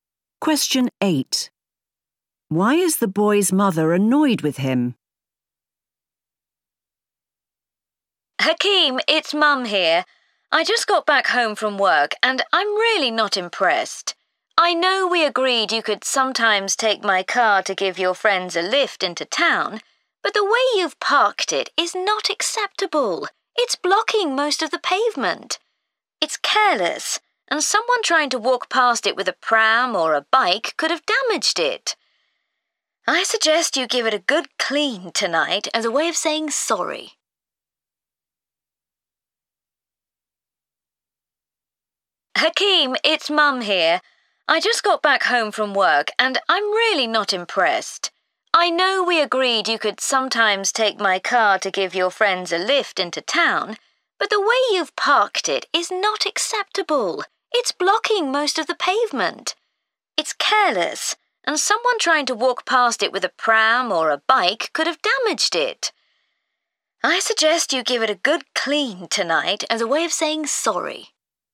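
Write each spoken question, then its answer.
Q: Why is the boy's mother annoyed with him?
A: He parked her car badly, blocking the pavement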